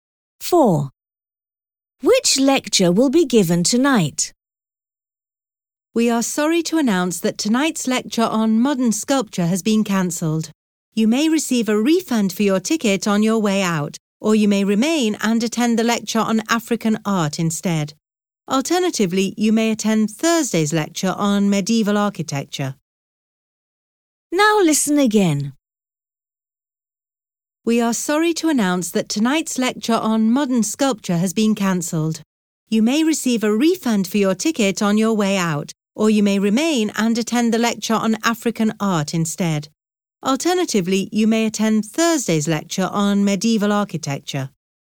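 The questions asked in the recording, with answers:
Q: Which lecture will be given tonight?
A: The lecture on African art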